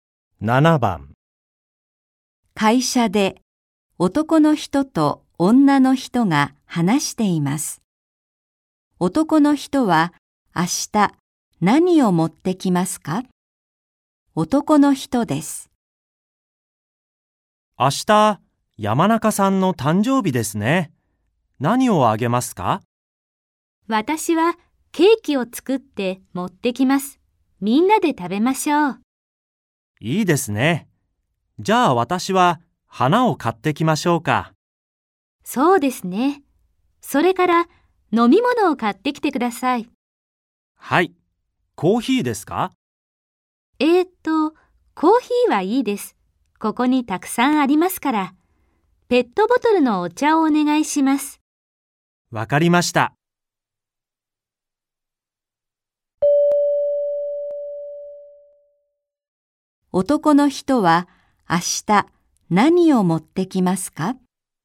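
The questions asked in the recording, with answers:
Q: 男の人は明日何を持ってきますか?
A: 花とペットボトルのお茶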